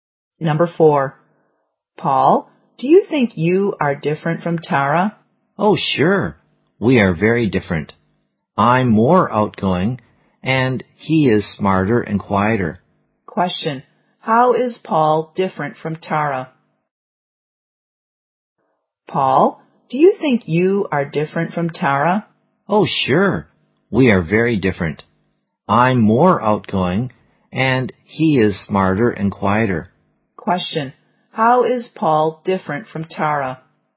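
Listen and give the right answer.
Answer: Paul is more outgoing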